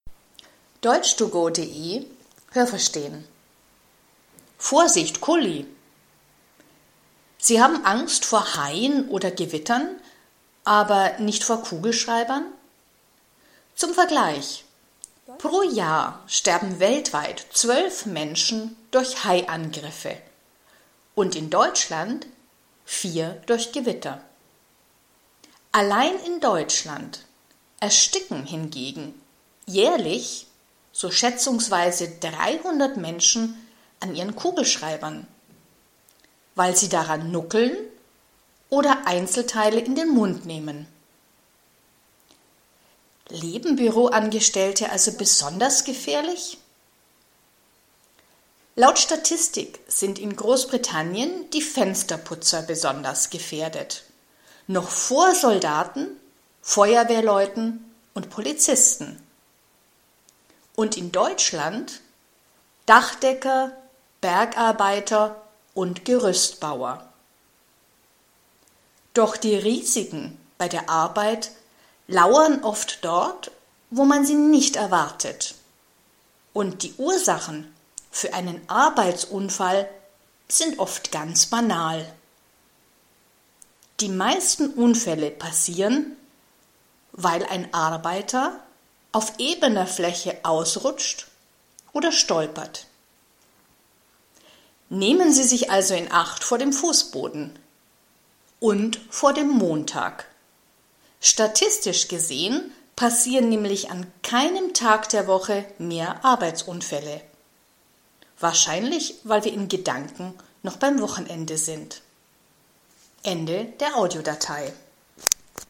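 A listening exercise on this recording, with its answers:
Haben Sie das gehört? Stimmt diese Aussage?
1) In Deutschland sterben pro Jahr mehr Leute durch Kugelschreiber als durch Gewitter.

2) 12 Deutsche sterben pro Jahr durch Haiangriffe.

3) Laut Statistik leben Büroangestellte besonders gefährlich.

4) Fensterputzer leben in Großbritannien genauso gefährlich wie Soldaten, Feuerwehrleute und Polizisten.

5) In Deutschland leben Dachdecker, Bergbewohner und Gerüstbauer gefährlich.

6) Die meisten Unfälle passieren, weil Menschen hinfallen.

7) Am Montag passieren weniger Unfälle als an anderen Wochentagen.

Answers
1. richtig
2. falsch
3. falsch
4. falsch
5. falsch
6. richtig
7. falsch

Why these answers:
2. Pro Jahr sterben 12 Menschen auf der ganzen Welt durch Haiangriffe.
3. Im Text ist das nur eine Frage. Die Statistik im Text sagt nichts dazu.
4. Fensterputzer leben am gefährlichsten, gefährlicher als Soldaten, Feuerwehrleute und Polizisten.
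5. Der Text spricht nicht von „Bergbewohnern", (= Menschen, die im Gebirge leben), sondern von „Bergarbeitern" (= Menschen, die im Bergbau beschäftigt sind, also z.B. Kohle oder Salz fördern).
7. Montags passieren die meisten Unfälle.

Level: B (mittel)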